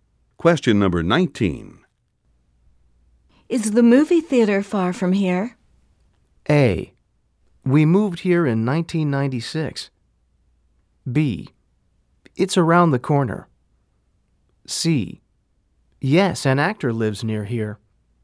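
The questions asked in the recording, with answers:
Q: Is the movie theater far from here?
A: B: It's around the corner.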